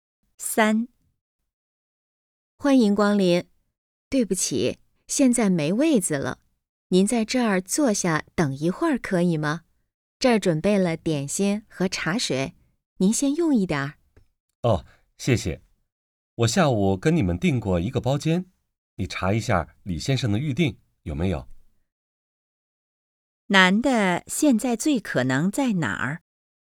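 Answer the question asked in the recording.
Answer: 饭店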